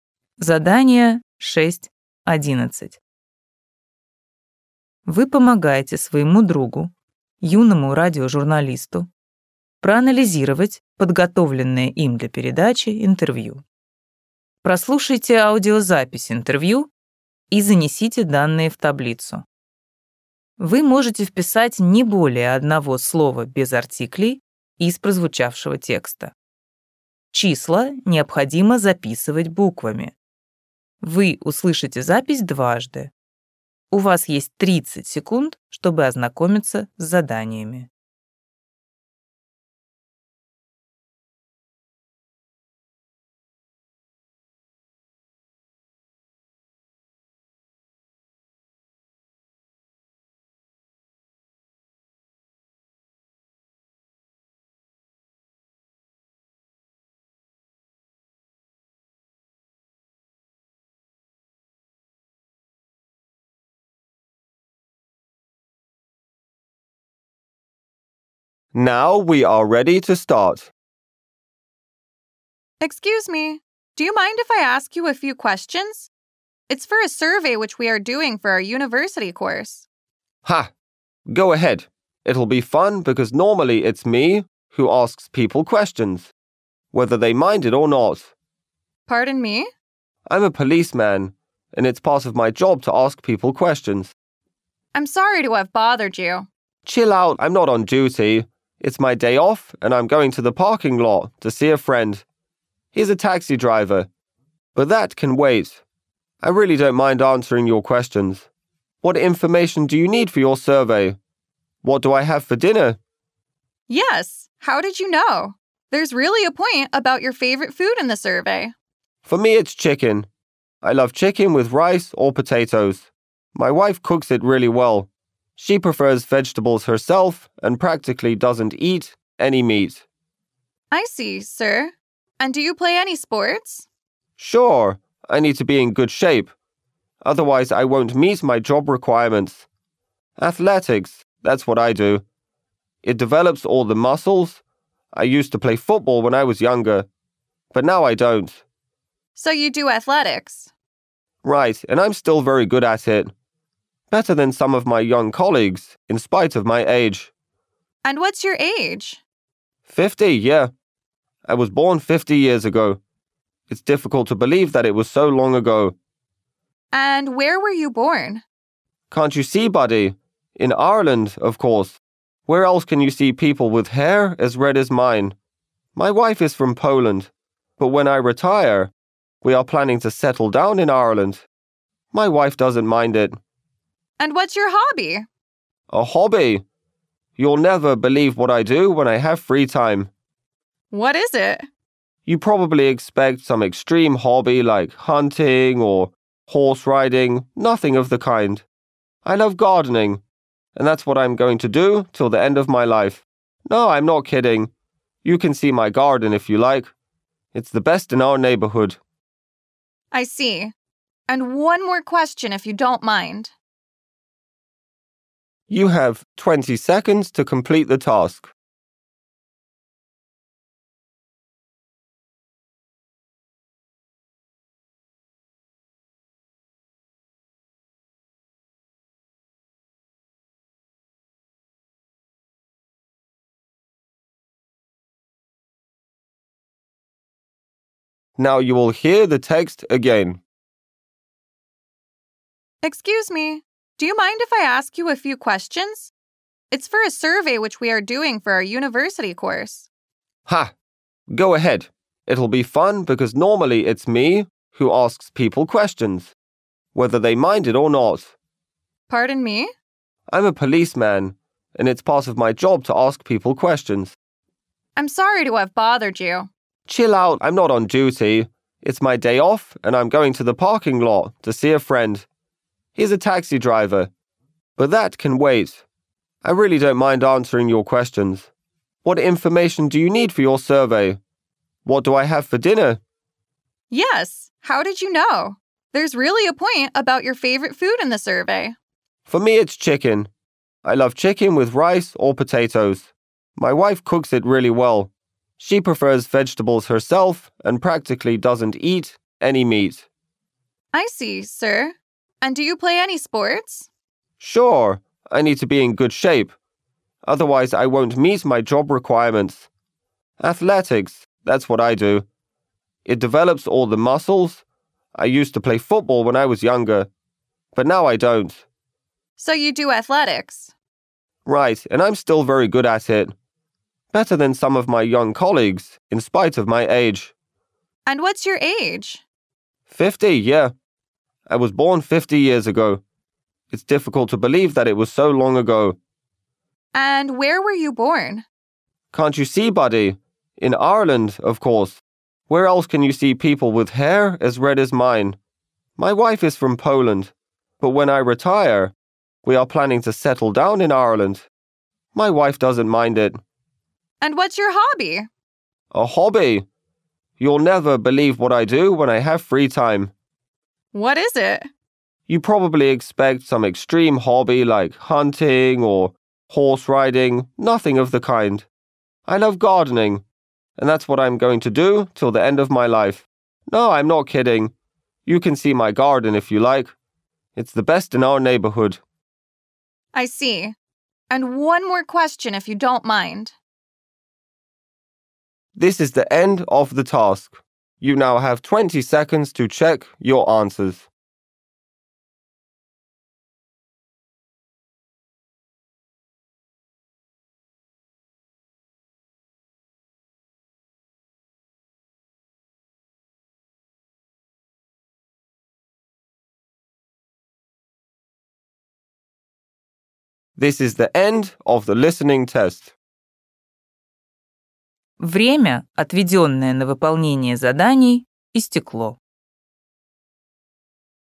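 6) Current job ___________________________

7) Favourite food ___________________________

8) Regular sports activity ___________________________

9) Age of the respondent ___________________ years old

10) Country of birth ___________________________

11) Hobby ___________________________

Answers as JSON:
{"6": "policeman", "7": "chicken", "8": "athletics", "9": "fifty", "10": "Ireland", "11": "gardening"}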